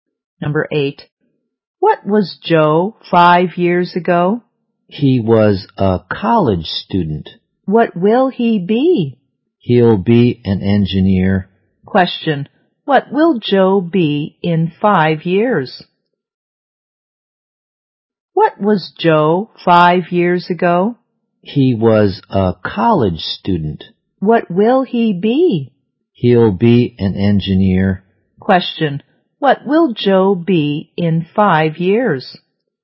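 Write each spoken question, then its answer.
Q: What will Joe be in 5 years?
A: An engineer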